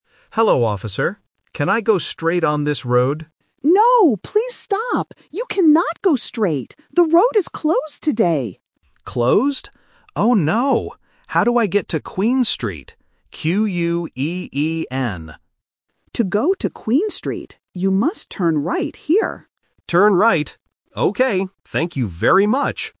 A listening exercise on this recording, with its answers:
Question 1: What does the driver want to do first?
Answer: Go straight

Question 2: What is the name of the street the driver is looking for?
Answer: Queen Street

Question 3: What must the driver do now?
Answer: Turn right